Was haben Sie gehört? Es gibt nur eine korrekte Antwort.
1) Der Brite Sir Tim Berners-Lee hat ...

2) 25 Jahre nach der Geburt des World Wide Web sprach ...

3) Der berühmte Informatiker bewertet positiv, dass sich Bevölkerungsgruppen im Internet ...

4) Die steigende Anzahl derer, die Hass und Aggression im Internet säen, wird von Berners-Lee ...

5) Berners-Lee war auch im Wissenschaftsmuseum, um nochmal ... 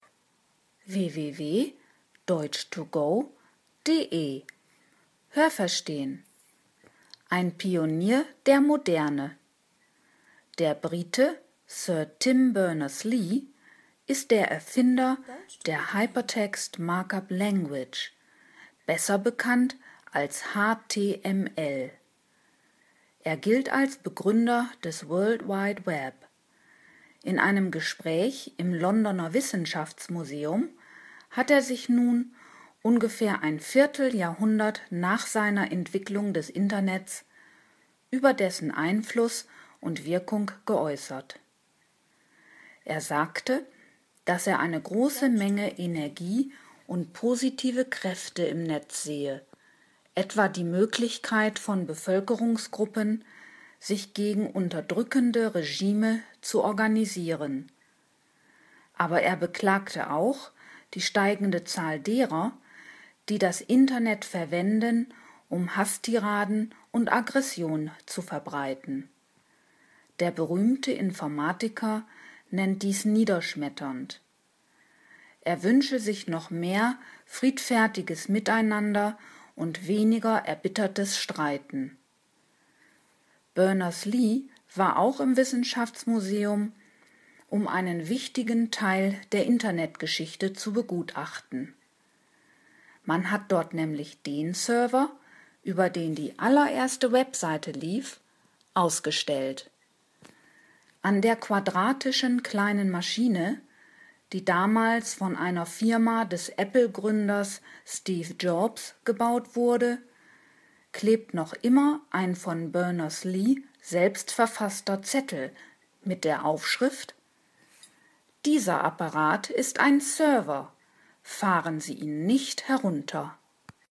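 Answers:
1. die Hypertext Markup Language (HTML) erfunden
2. Berners-Lee im Londoner Wissenschaftsmuseum über Einfluss und Wirkung des Internets
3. gegen unterdrückende Regime organisieren können
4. beklagt und als niederschmetternd bezeichnet
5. einen wichtigen Teil der Internetgeschichte (den ersten Webserver) zu begutachten

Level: C (schwer)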